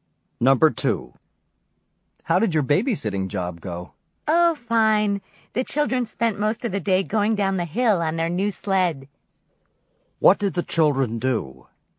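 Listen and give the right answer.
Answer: Went sledding down the hill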